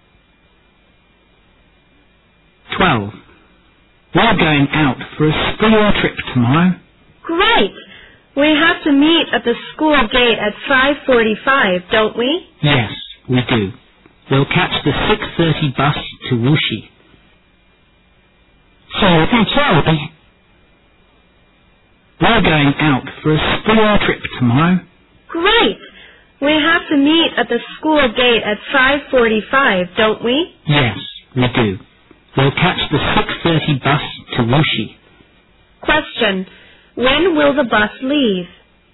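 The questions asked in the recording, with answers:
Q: When will the bus leave?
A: At 6:30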